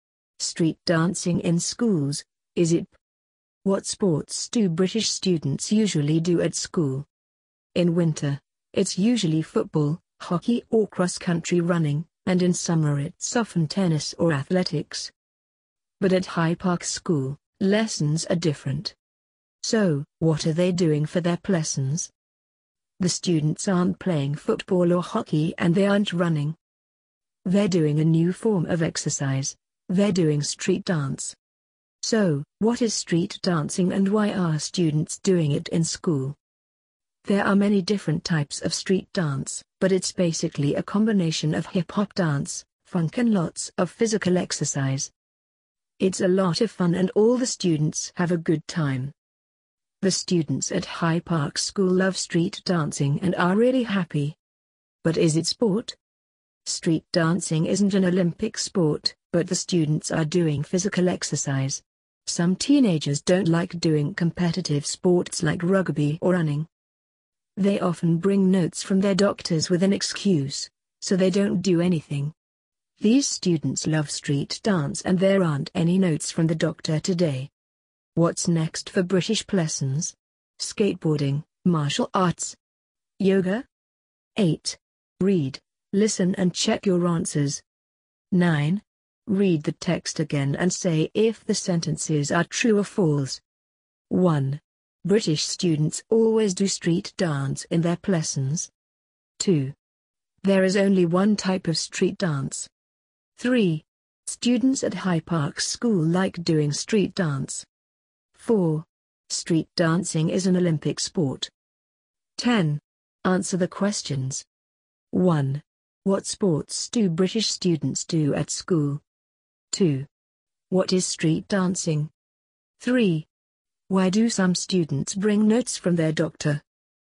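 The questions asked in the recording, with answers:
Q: British students always do street dance in their lessons.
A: False

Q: There is only one type of street dance.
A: False

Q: Students at High Park School like doing street dance.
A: True

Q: Street dancing is an Olympic sport.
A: False

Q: What sports do British students do at school?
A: Football, hockey or cross-country running in winter; tennis or athletics in summer

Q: What is street dancing?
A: A combination of hip-hop dance, funk and lots of physical exercise

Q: Why do some students bring notes from their doctor?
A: They don't like competitive sports like rugby or running, so they bring an excuse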